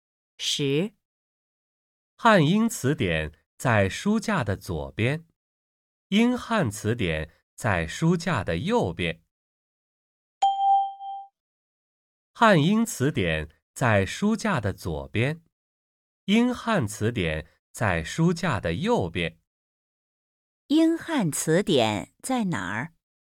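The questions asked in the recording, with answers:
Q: 英汉词典在哪儿?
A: 在书架的右边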